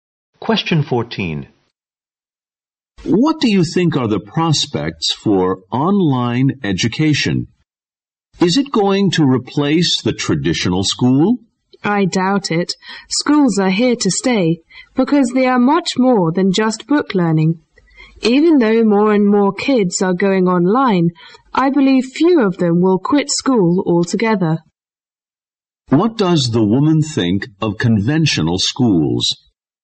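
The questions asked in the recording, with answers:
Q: What does the woman think of conventional schools?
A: Online education will not replace them; they are here to stay.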